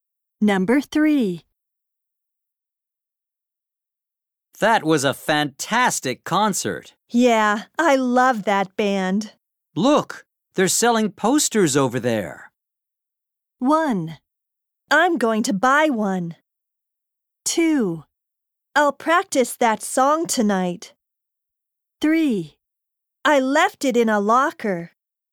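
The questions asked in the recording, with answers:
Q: Look, they're selling posters over there.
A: 1: I'm going to buy one.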